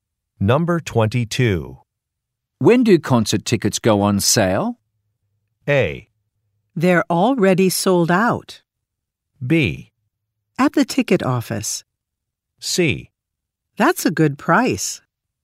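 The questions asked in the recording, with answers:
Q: When do concert tickets go on sale?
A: A: They're already sold out.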